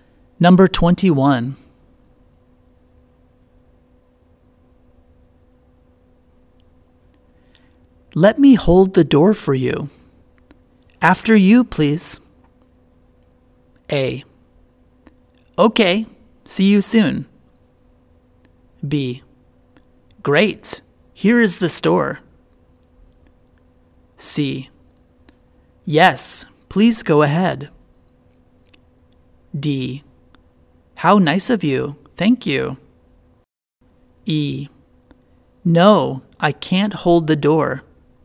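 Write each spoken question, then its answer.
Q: Let me hold the door for you.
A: D: How nice of you, thank you.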